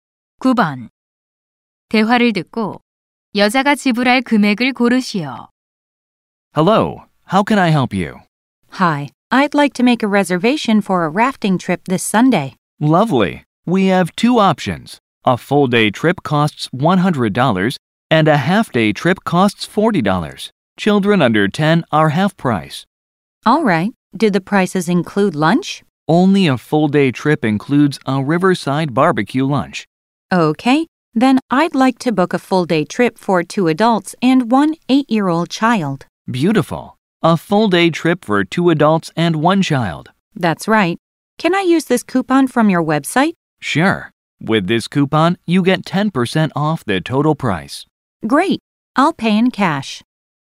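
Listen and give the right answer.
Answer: 225달러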